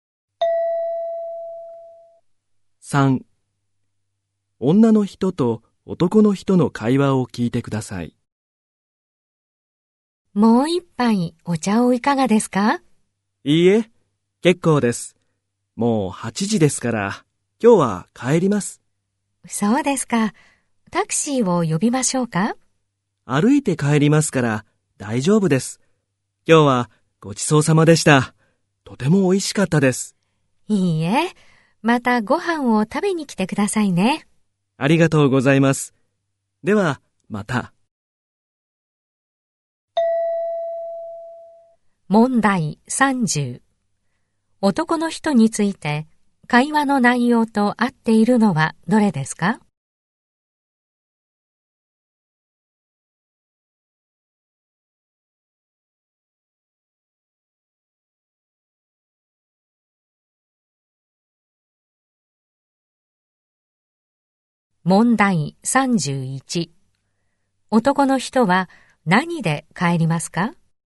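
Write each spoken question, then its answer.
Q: 男の人は何で帰りますか?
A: 歩いて帰る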